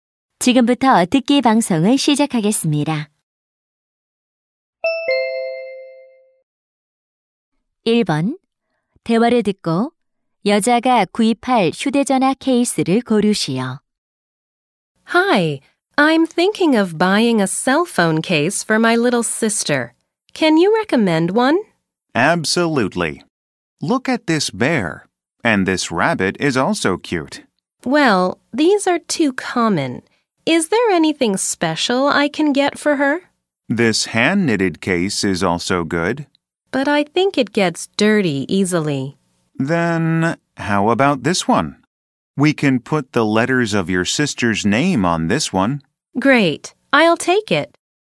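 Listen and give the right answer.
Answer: 여동생 이름 글자를 넣을 수 있는 케이스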